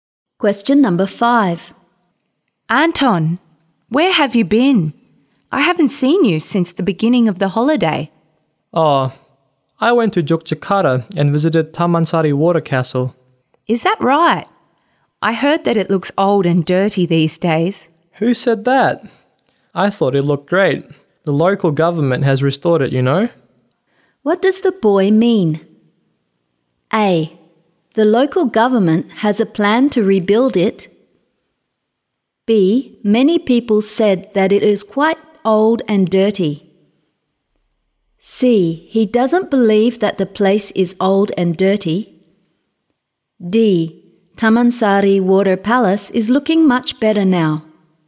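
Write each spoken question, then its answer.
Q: What does the boy mean?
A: D: Tamansari Water Palace is looking much better now.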